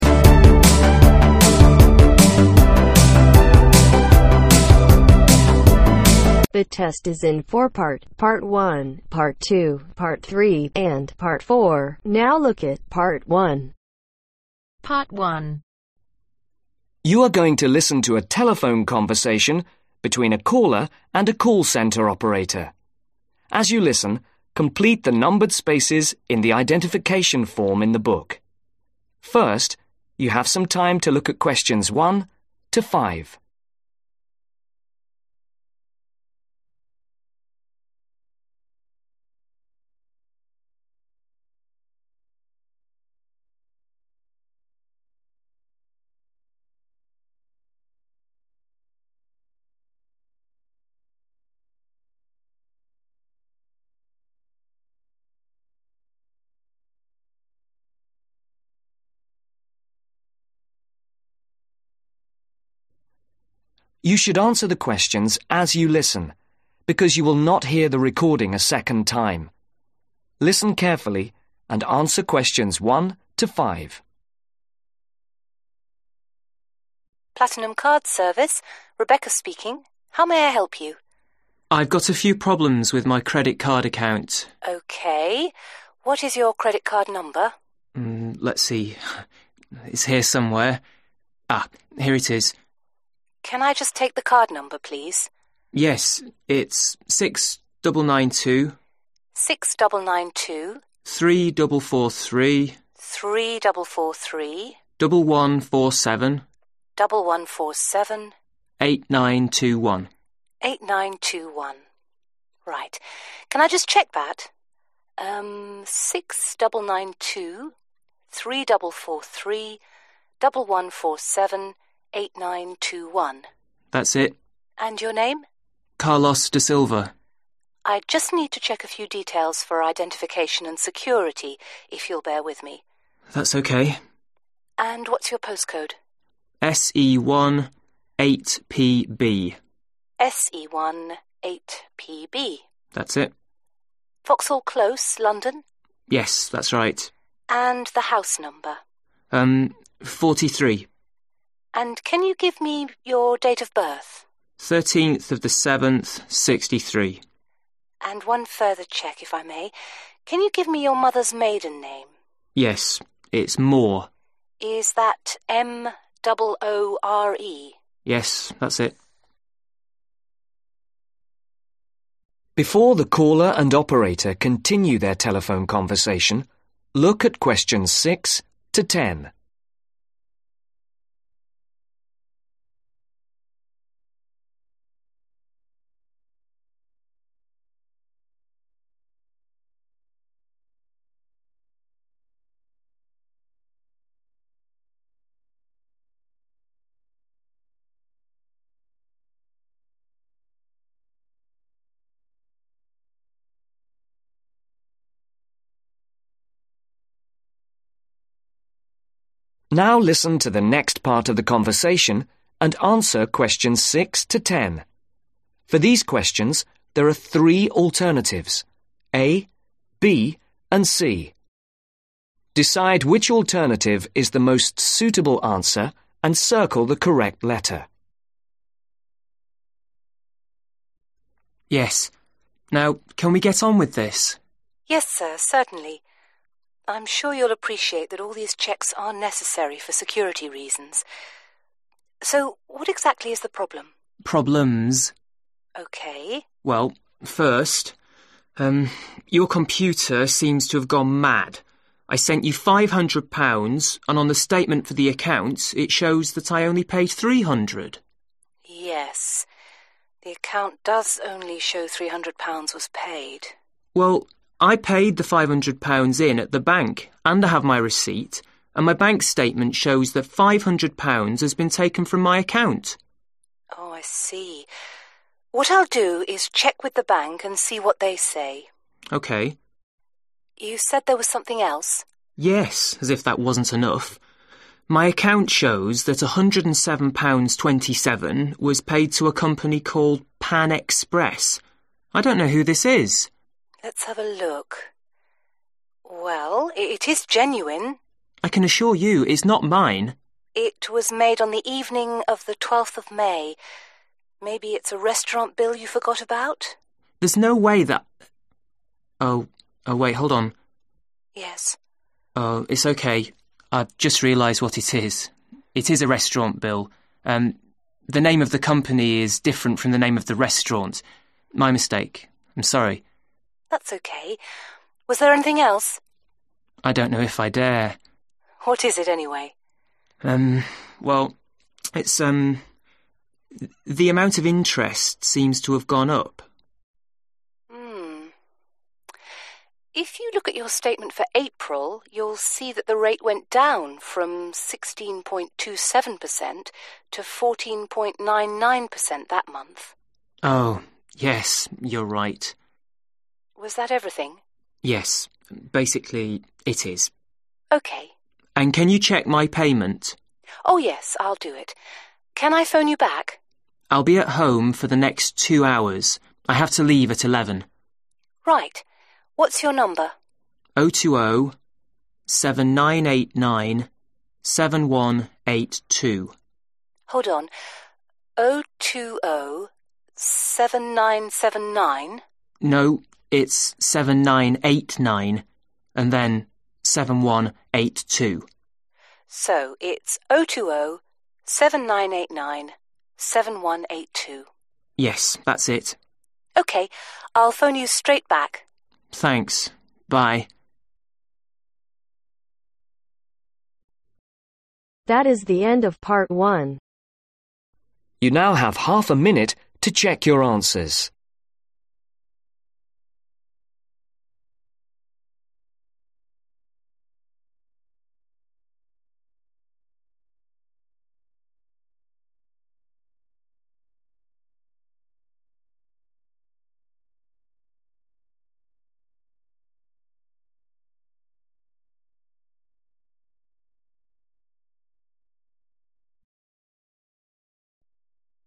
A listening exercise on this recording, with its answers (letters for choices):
Complete the details below. Write NO MORE THAN TWO WORDS OR A NUMBER for each answer.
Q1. Card number : 6992 (1)............ 11478921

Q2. Postcode : (2)............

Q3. Address : (3)............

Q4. Date of birth : 13 July (4)............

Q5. Mother's Malden name : (5)............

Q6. The caller has paid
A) less than the computer shows.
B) more than the computer shows.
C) £500 twice.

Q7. The caller is also worried about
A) a bill that is too high.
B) an overpayment to a restaurant.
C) a payment that he does not recognize.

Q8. The interest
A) went up in April.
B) has not changed.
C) has gone down.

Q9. The caller's number is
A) 020 7997 9909.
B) 020 7989 7182.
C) 020 8979 7182.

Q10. The operator will ring the caller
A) tomorrow.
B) in two hours.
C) very soon.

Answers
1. 3443
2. SE1 8PB
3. 43
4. 1963
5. MOORE
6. B
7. C
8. C
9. B
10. C